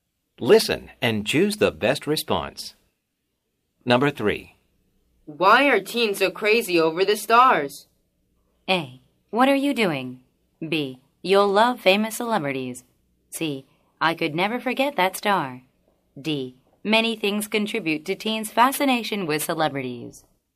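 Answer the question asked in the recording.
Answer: D: Many things contribute to teens' fascination with celebrities.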